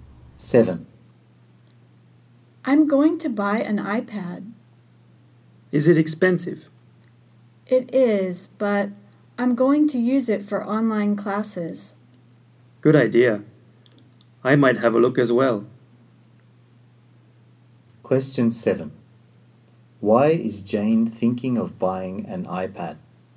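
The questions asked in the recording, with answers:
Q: Why is Jane thinking of buying an iPad?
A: To use it for online classes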